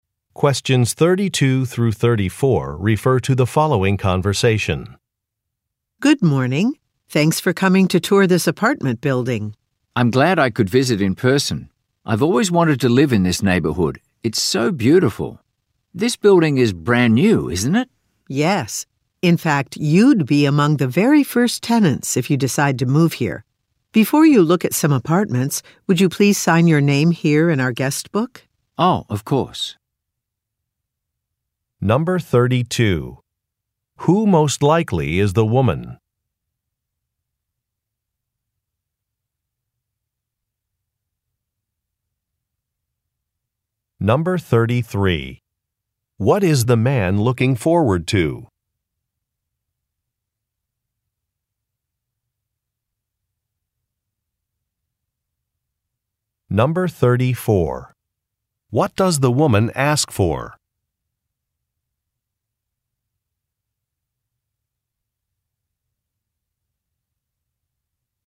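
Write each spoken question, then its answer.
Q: What is the man looking forward to?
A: Living in the neighborhood

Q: What does the woman ask for?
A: His signature in the guest book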